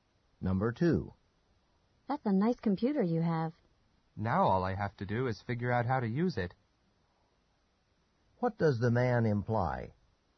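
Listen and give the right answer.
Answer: He doesn't know how to use the computer yet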